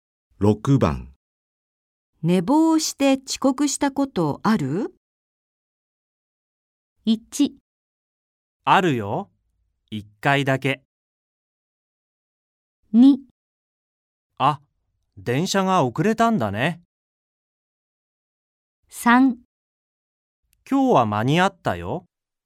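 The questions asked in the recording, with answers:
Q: 寝坊して遅刻したことある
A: 1: あるよ。1回だけ。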